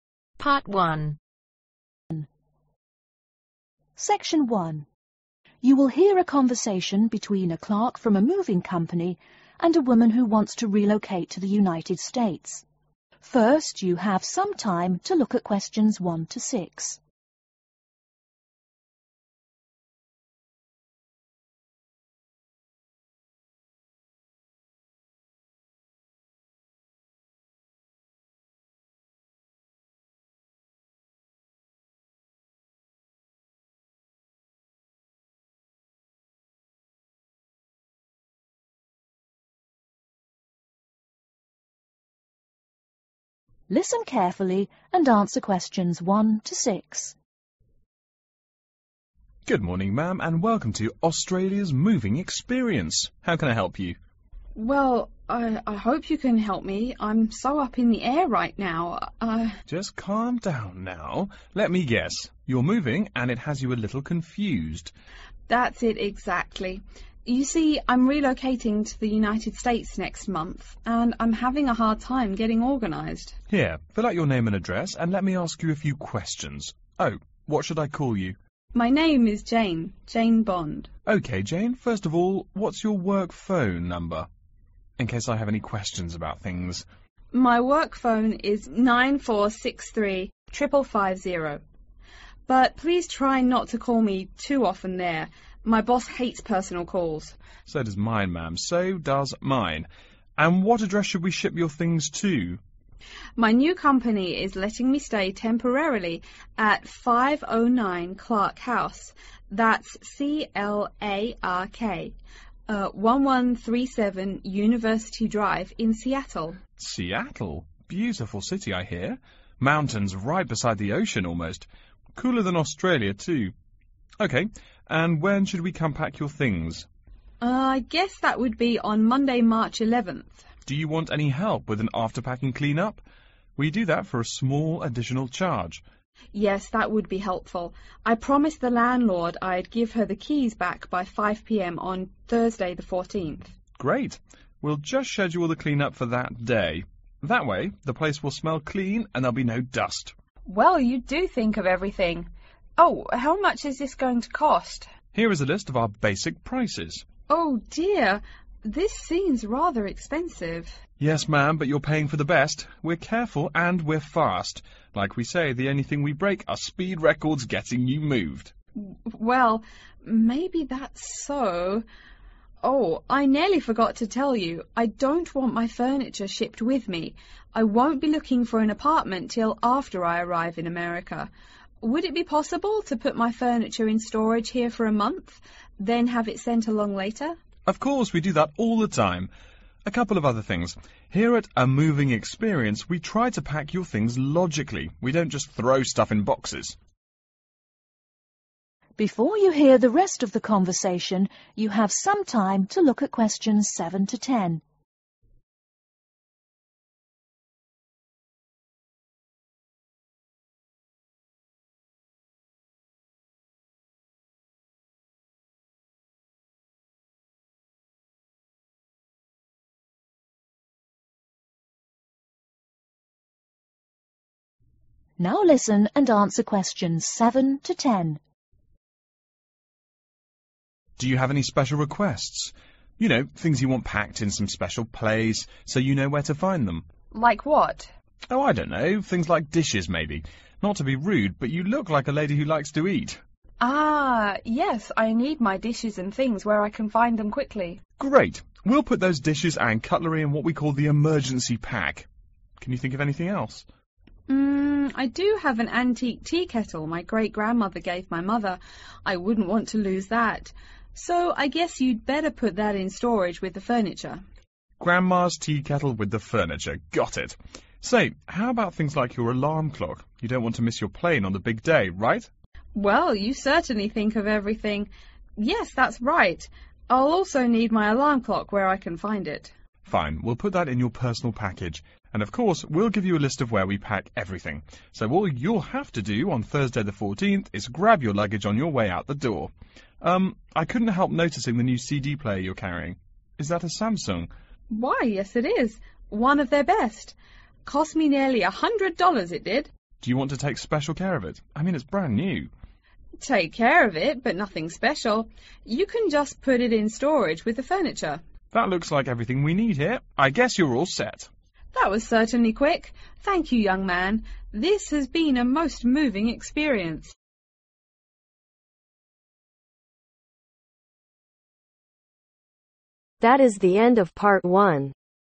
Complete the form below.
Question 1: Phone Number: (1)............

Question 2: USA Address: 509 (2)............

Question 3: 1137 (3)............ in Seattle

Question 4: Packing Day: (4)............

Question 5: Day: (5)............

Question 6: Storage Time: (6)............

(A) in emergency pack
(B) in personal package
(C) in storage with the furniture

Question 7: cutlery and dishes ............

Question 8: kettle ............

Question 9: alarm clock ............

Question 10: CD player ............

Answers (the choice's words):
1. 94635550
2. Clark House
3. University Drive
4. Monday
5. Thursday
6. a / one month
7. in emergency pack
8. in storage with the furniture
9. in personal package
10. in storage with the furniture